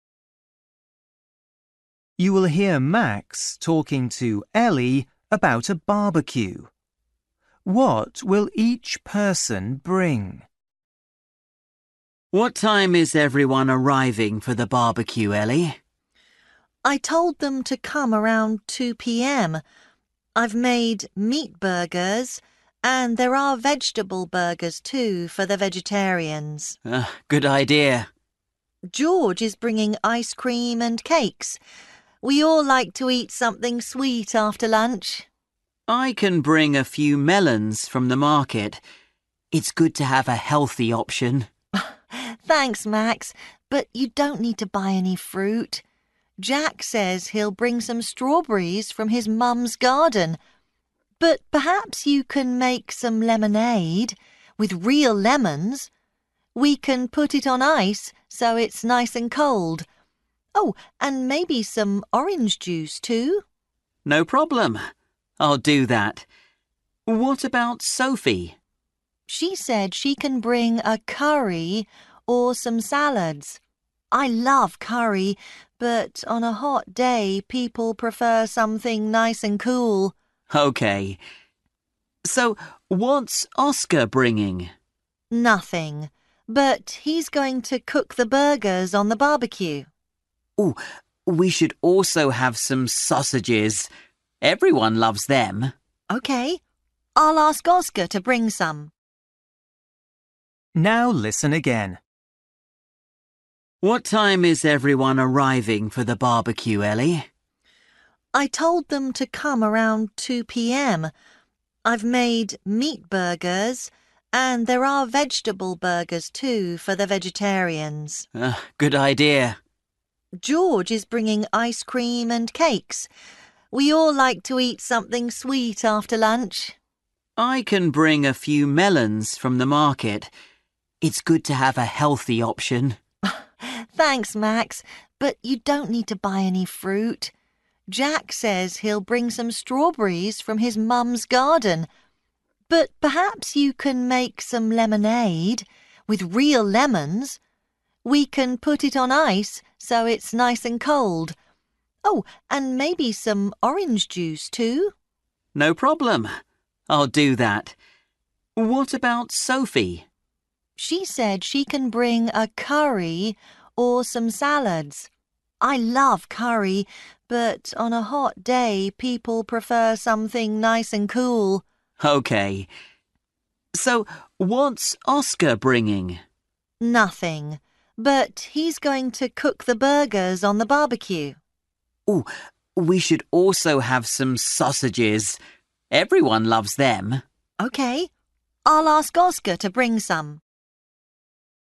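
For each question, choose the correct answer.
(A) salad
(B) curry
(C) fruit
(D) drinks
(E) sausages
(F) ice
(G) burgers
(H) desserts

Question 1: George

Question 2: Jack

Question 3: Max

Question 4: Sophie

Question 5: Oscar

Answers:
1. H
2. C
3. D
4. A
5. E

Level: Luyện nghe trình độ A2

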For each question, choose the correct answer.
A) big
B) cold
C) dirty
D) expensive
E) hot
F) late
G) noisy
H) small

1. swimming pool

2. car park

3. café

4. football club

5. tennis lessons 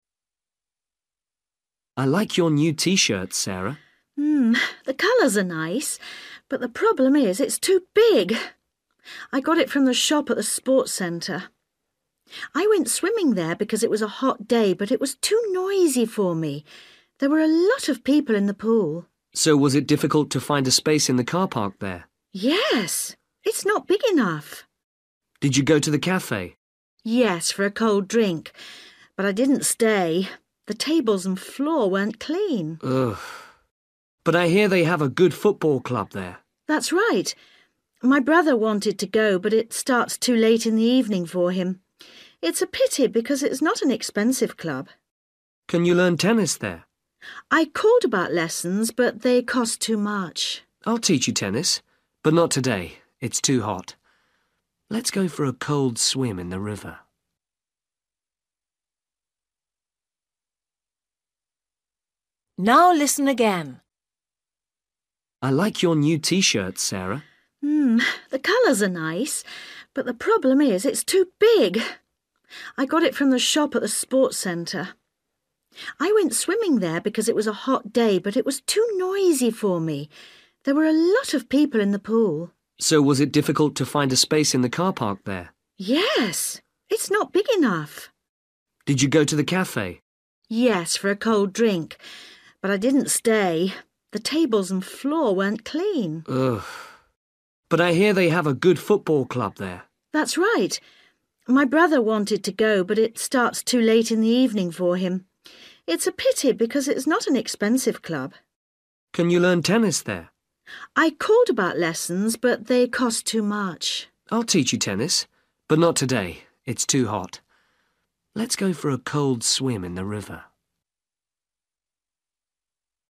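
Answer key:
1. G
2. H
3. C
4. F
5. D

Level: Luyện nghe trình độ A2

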